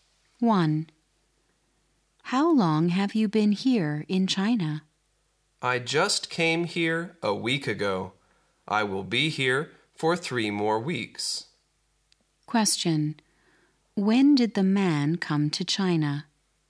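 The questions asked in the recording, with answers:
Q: When did the man come to China?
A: A week ago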